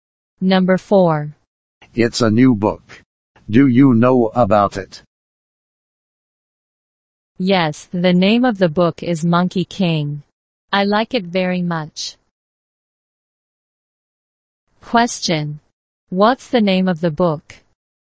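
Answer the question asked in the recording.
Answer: Monkey King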